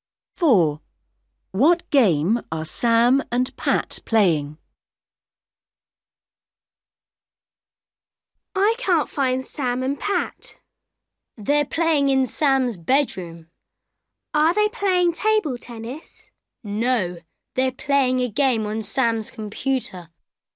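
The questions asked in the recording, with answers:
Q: What game are Sam and Pat playing?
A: a computer game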